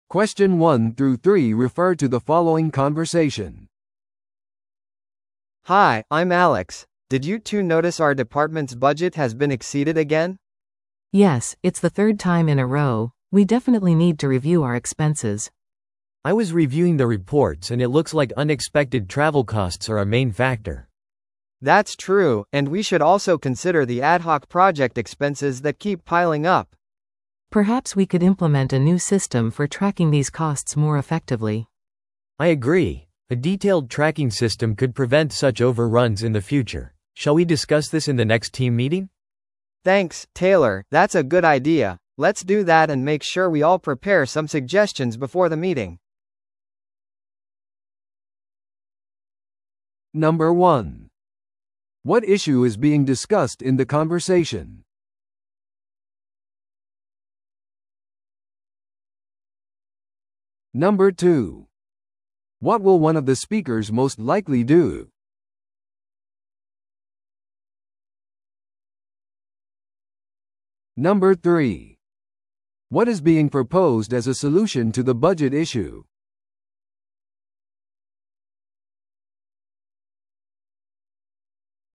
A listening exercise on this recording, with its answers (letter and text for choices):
Listen to the audio below and answer the questions.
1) What issue is being discussed in the conversation?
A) スタッフメンバーが辞任している。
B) 会計ソフトウェアの問題がある。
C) 部門の予算がオーバーしている。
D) 新しい追跡システムが導入された。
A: C) 部門の予算がオーバーしている。

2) What will one of the speakers most likely do?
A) パフォーマンスレポートを準備する。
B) チームに謝罪のメールを送る。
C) 他の部門とアイデアを共有する。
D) 次回の会議のために提案を準備する。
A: D) 次回の会議のために提案を準備する。

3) What is being proposed as a solution to the budget issue?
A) スタッフの出張を減らす。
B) 新しいコスト追跡システムを導入する。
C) 臨時プロジェクトの費用を削減する。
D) 部門の再構築計画を立てる。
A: B) 新しいコスト追跡システムを導入する。

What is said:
A: Hi, I'm Alex. Did you two notice our department's budget has been exceeded again?
B: Yes, it's the third time in a row. We definitely need to review our expenses.
C: I was reviewing the reports and it looks like unexpected travel costs are a main factor.
A: That's true, and we should also consider the ad-hoc project expenses that keep piling up.
B: Perhaps we could implement a new system for tracking these costs more effectively.
C: I agree. A detailed tracking system could prevent such overruns in the future. Shall we discuss this in the next team meeting?
A: Thanks, Taylor, that's a good idea. Let's do that and make sure we all prepare some suggestions before the meeting.